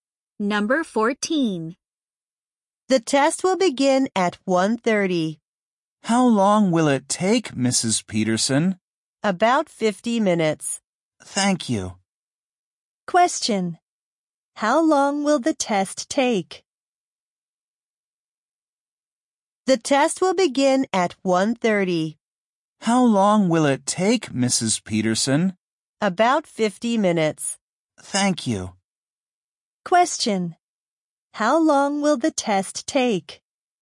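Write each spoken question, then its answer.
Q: How long will the test take?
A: About 50 minutes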